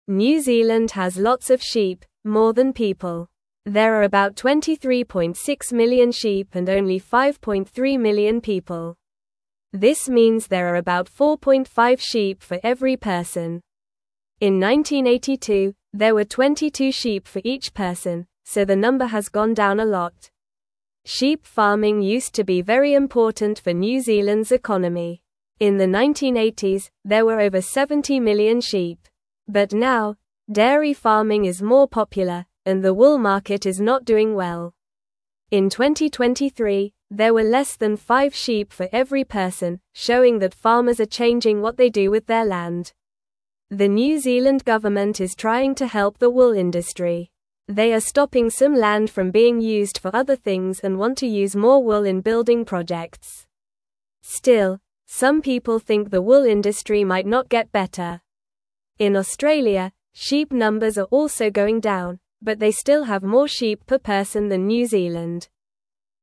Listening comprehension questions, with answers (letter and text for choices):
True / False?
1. The New Zealand government is not trying to help the wool industry.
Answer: False

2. In 1982, there were 22 sheep for every person in New Zealand.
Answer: True

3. New Zealand has more sheep than people.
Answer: True

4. New Zealand has about 5.7 million people.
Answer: False

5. The wool market is doing well right now.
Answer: False

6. Dairy farming is now more popular than sheep farming in New Zealand.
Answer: True

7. Sheep farming was very important for New Zealand's economy in the past.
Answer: True

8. What type of farming is now more popular in New Zealand?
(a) Vegetable farming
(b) Fruit farming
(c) Dairy farming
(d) Fish farming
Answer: (c) Dairy farming

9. How many sheep were there in New Zealand in the 1980s?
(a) Over 70 million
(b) 30 million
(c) 50 million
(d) 40 million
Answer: (a) Over 70 million

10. What is the government trying to help?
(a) The dairy industry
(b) The wool industry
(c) The vegetable market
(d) The fruit market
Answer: (b) The wool industry

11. What is the current number of sheep for every person in 2023?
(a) About ten sheep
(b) About twenty sheep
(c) Less than five sheep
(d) About fifteen sheep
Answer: (c) Less than five sheep

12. Which country has more sheep per person than New Zealand?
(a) Canada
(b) South Africa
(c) United States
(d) Australia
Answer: (d) Australia

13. Why is sheep farming not as important today in New Zealand?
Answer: Sheep farming is not as important today because dairy farming is more popular and the wool market is not doing well.

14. What type of farming is more popular now than sheep farming?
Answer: Dairy farming is more popular now than sheep farming.

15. What is the New Zealand government doing to help the wool industry?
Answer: The New Zealand government is stopping some land from being used for other things and wants to use more wool in building projects.

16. How does the number of sheep in Australia compare to New Zealand?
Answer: In Australia, sheep numbers are also going down, but they still have more sheep per person than New Zealand.

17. New Zealand has lots of (1)______, more than people.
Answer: sheep

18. This (2)______ there are about 4.5 sheep for every person.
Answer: means

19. In 1982, there (3)______ 22 sheep for each person, so the number has gone down a lot.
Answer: were

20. Sheep (4)______ used to be very important for New Zealand's (5)______.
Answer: farming

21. Sheep (4)______ used to be very important for New Zealand's (5)______.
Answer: economy

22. But now, dairy farming is more popular, and the wool market is not (6)______ well.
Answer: doing

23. In 2023, there were less than five sheep for every person, (7)______ that farmers are (8)______ what they do with their land.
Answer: showing

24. In 2023, there were less than five sheep for every person, (7)______ that farmers are (8)______ what they do with their land.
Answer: changing

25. The New Zealand government is trying to (9)______ the wool industry.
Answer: help

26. They are stopping some land from being used for other things and want to use more wool in building (10)______.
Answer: projects

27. Still, some people (11)______ the wool industry might not get better.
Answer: think

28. In Australia, sheep numbers are also going down, but they still have more sheep per (12)______ than New Zealand.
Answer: person

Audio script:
New Zealand has lots of sheep, more than people. There are about 23.6 million sheep and only 5.3 million people. This means there are about 4.5 sheep for every person. In 1982, there were 22 sheep for each person, so the number has gone down a lot.
Sheep farming used to be very important for New Zealand's economy. In the 1980s, there were over 70 million sheep. But now, dairy farming is more popular, and the wool market is not doing well. In 2023, there were less than five sheep for every person, showing that farmers are changing what they do with their land.
The New Zealand government is trying to help the wool industry. They are stopping some land from being used for other things and want to use more wool in building projects. Still, some people think the wool industry might not get better. In Australia, sheep numbers are also going down, but they still have more sheep per person than New Zealand.

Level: Level 2